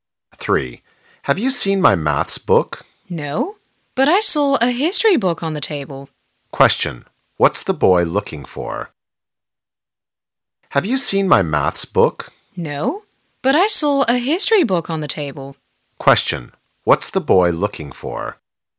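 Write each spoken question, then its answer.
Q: What's the boy looking for?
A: His maths book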